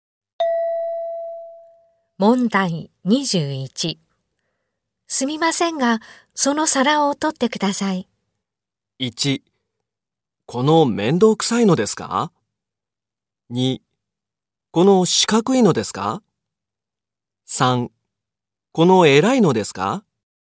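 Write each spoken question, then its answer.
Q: すみませんが、その皿を取ってください。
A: 2: この四角いのですか?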